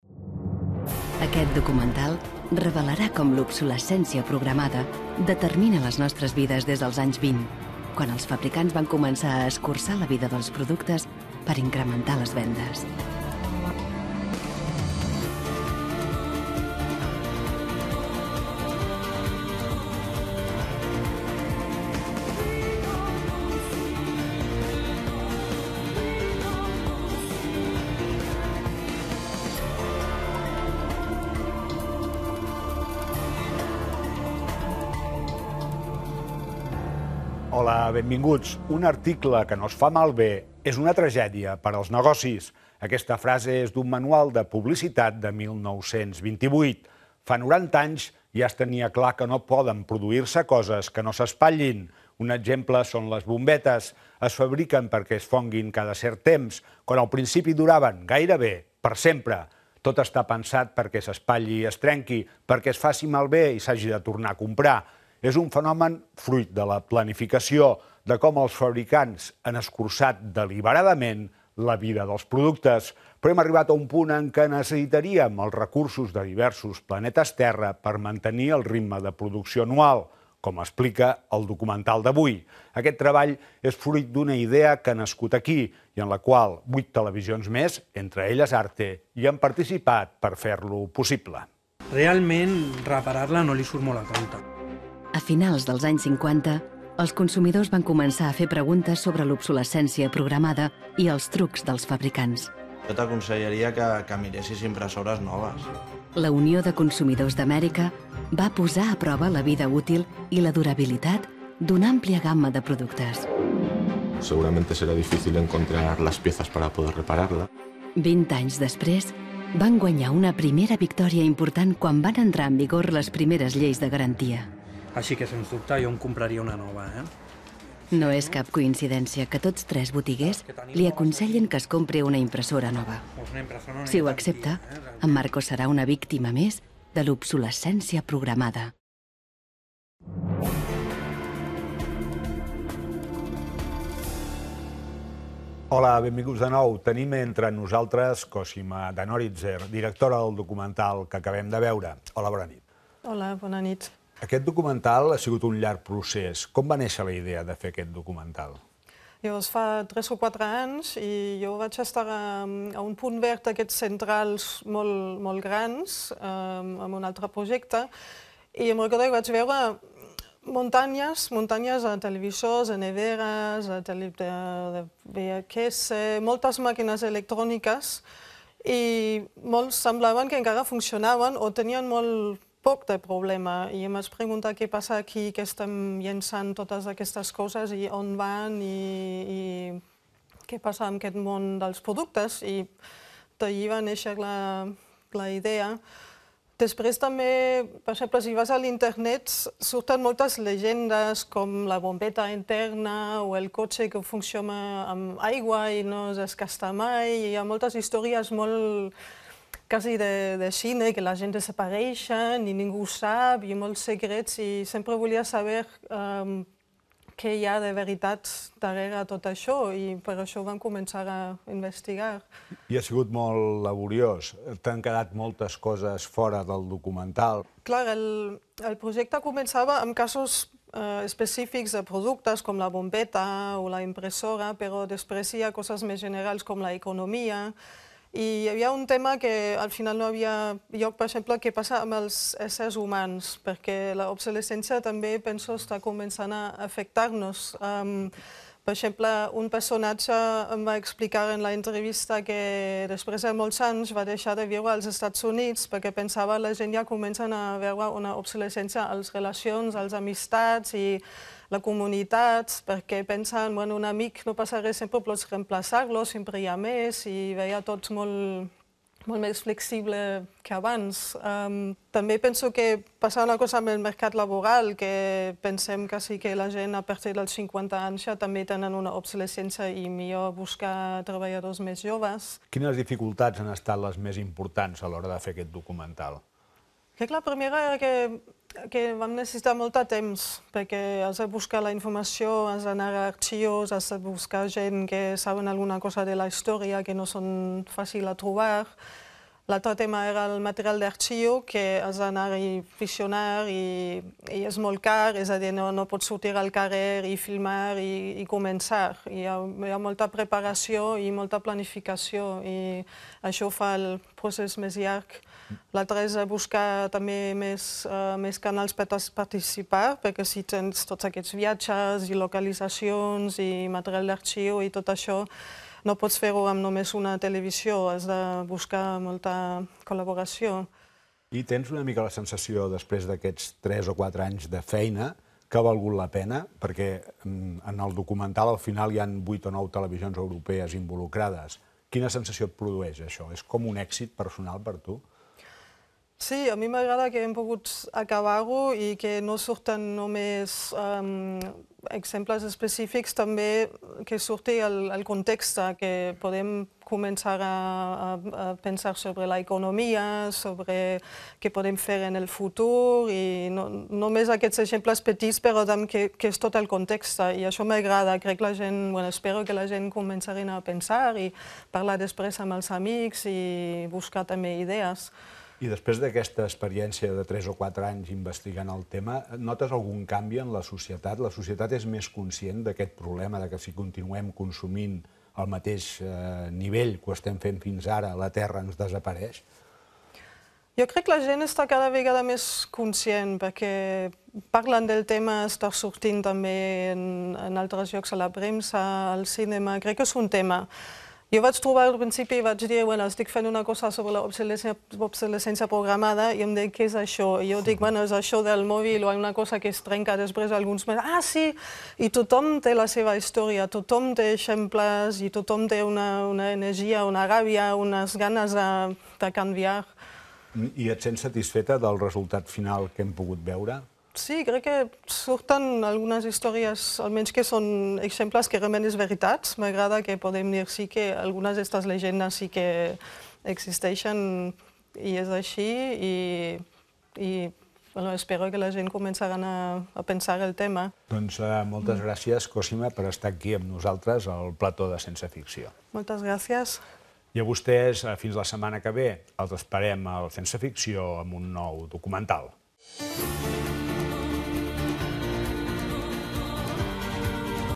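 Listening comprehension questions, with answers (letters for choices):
Instruccions. A continuació, escoltareu dues vegades un fragment resum d'un programa dedicat a l'obsolescència programada. En acabar, disposareu de dos minuts per a contestar o per a repassar les respostes. Escriviu en l'espai buit la lletra que tinga l'opció correcta.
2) Als anys 20...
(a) els manuals de publicitat ja recomanaven la fabricació de productes caducs.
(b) no existia regulació per a l'obsolescència programada.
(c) aparegué la primera rentadora amb data de caducitat.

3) L'obsolescència programada és...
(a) causada per la pitjor qualitat de les matèries primeres en l'actualitat.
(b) un dels principals objectius de les multinacionals tecnològiques.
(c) un fenomen premeditat.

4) El primer producte que es coneix que va ser fabricat amb obsolescència programada fou...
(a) la bombeta.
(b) la rentadora.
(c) el cotxe.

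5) Els dependents recomanen sistemàticament la compra d'un producte nou en lloc de reparar-lo perquè...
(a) miren pel bé del consumidor.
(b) volen estafar el client.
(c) és la política d'empresa per tal de vendre més productes.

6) La directora del documental explica que va decidir fer-lo...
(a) perquè li ho va proposar TV3.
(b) perquè estava encuriosida sobre les informacions de productes existents infal·libles que no se sap per què no es comercialitzen.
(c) perquè estava farta de veure muntanyes d'electrodomèstics inservibles als abocadors de la seua comarca.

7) El concepte d'obsolescència programada aplicat als éssers humans tindria el sentit que...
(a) cada vegada tenim menys temps per a gaudir de la família i dels amics.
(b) els productes que consumim ens contaminen amb elements tòxics i per això morim abans, sobretot per causa del càncer.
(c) ara pensem que les relacions socials no són tan importants perquè són reemplaçables.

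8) Els principals handicaps en la realització del documental han estat...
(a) la recollida d'informació, l'accés a materials d'arxiu, la planificació i la cerca de finançament.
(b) el poc temps de què disposaven, la diversitat cultural de l'equip i la planificació farragosa.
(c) la recollida d'informació, la planificació que es va haver de modificar durant el procés i la denegació de subvencions.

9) Un cop finalitzada la realització, la directora està contenta sobretot...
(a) per l'èxit i pels reconeixements i guardons obtinguts i per la qualitat de producte obtingut.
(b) perquè ha aconseguit despertar consciències i pel premi rebut.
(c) per haver-lo pogut acabar, per haver mostrat contextos diferents i perquè es mostren opcions de futur.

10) Quant a la conscienciació de la societat envers la problemàtica que envolta l'obsolescència programada...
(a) la directora afirma que encara queda molt per fer.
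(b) que caldrien molts més documentals com el seu per tal de despertar consciències.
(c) la gent és ara més conscient, que hi ha ganes de canviar i que tothom ho ha experimentat.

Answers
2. a
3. c
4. a
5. c
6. b
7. c
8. a
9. c
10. c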